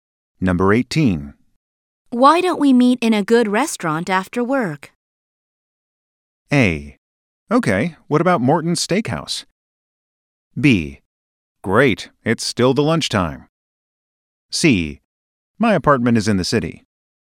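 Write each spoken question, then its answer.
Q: Why don't we meet in a good restaurant after work?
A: A: Okay, what about Morton's Steakhouse?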